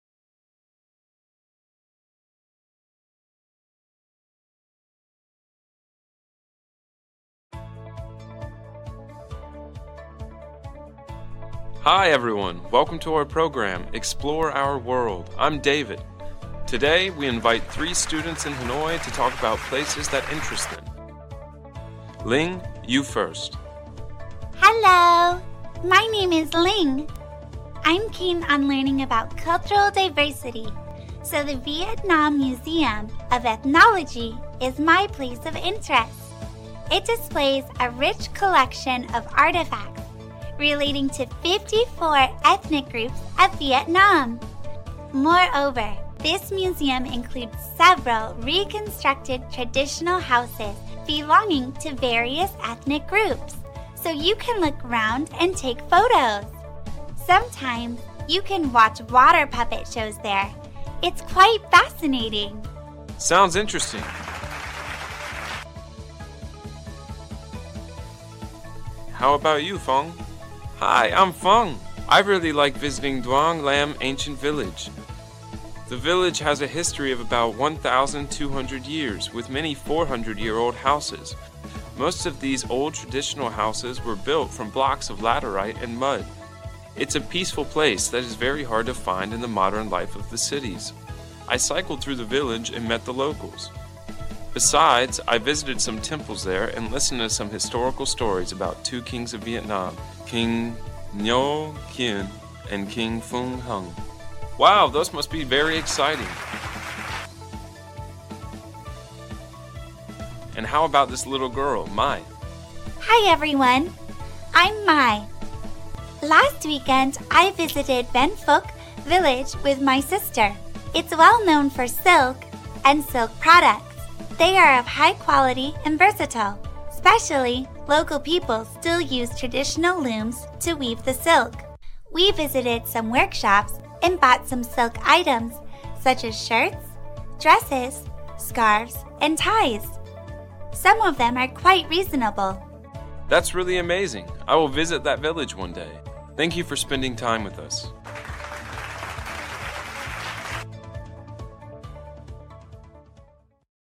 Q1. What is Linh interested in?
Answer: Cultural diversity

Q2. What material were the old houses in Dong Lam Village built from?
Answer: Laterite and mud

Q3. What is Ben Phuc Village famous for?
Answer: Silk

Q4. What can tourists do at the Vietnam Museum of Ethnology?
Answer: Watch water puppet shows

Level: lớp 9